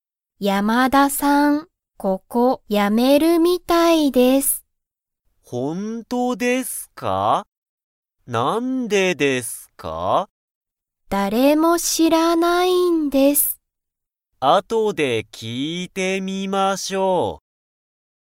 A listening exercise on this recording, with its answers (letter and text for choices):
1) ____は、ここをやめるみたいだ。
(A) 山田やまださん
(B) かなこ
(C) 田中(たなか)さん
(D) しょう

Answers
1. (A) 山田やまださん

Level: Level 1